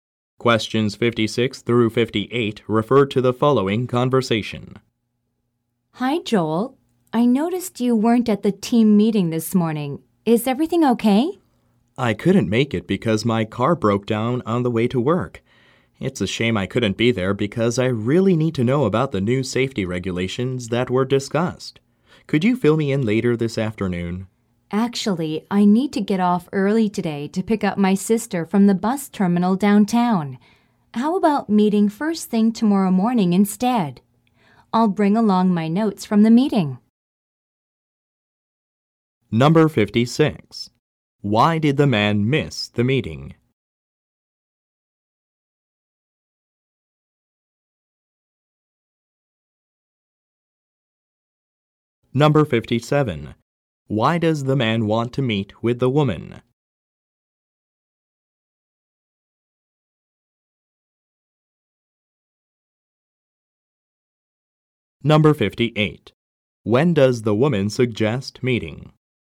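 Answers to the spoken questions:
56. His car broke down on the way to work.
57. To learn about the new safety regulations discussed at the meeting.
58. First thing tomorrow morning.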